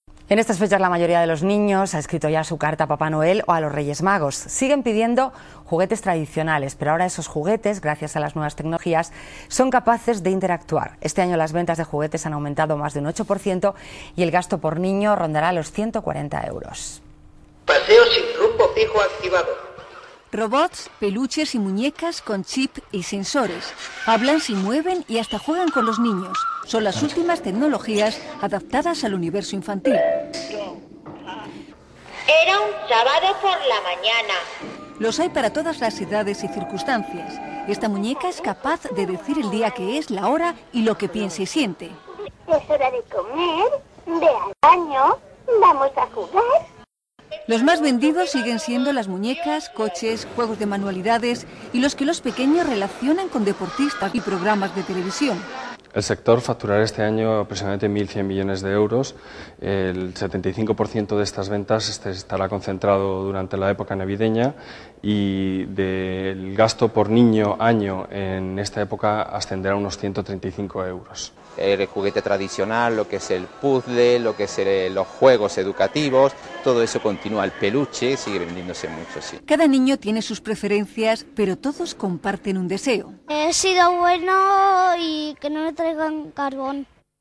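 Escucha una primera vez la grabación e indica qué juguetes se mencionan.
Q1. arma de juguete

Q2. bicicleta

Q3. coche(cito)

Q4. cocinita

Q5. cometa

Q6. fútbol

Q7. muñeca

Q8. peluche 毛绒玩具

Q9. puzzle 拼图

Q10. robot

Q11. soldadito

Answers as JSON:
{"1": "no", "2": "no", "3": "sí", "4": "no", "5": "no", "6": "no", "7": "sí", "8": "sí", "9": "sí", "10": "sí", "11": "no"}

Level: 中级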